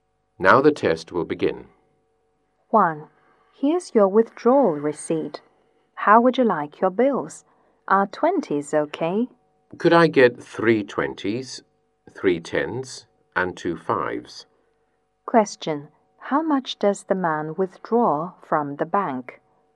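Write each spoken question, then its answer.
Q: How much does the man withdraw from the bank?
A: $100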